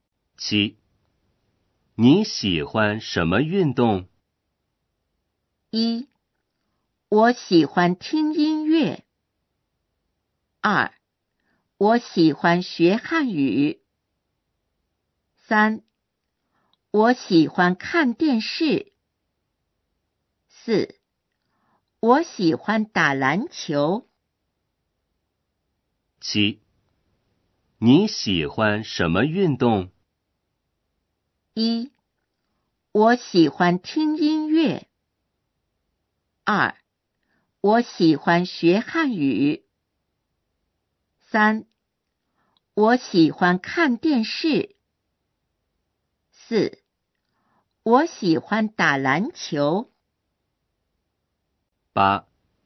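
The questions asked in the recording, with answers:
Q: 你喜欢什么运动?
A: 4: 我喜欢打篮球。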